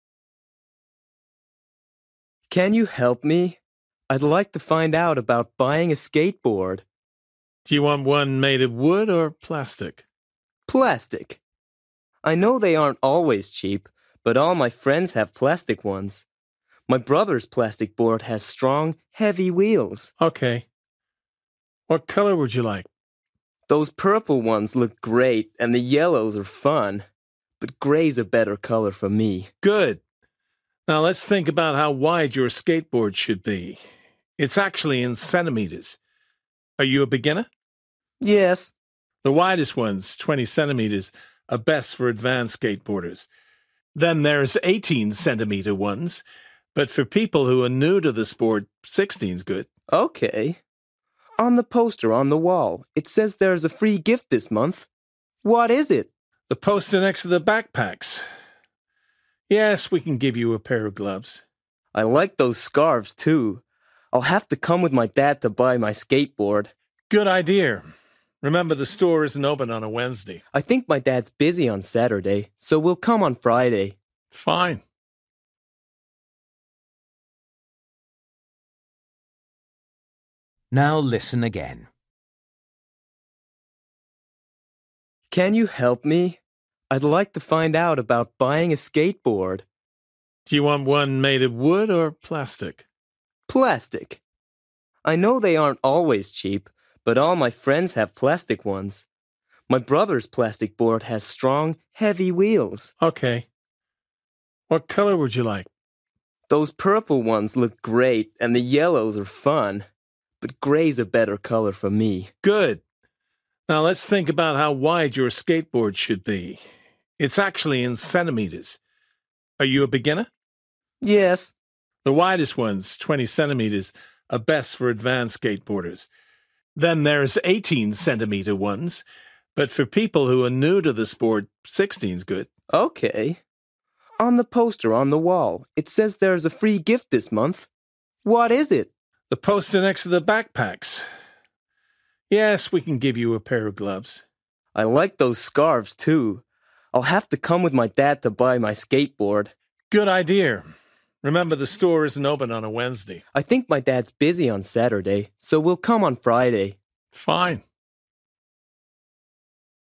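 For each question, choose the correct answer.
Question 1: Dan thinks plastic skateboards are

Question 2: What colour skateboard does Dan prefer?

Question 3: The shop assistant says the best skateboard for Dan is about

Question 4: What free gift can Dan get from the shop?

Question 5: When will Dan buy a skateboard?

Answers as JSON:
{"1": "not always cheap", "2": "grey", "3": "16 centimetres wide", "4": "a pair of gloves", "5": "on Friday"}

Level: Luyện nghe trình độ A2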